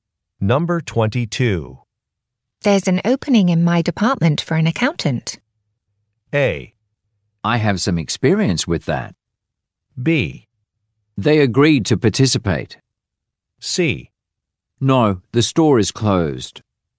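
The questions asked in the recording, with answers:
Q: There's an opening in my department for an accountant.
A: A: I have some experience with that.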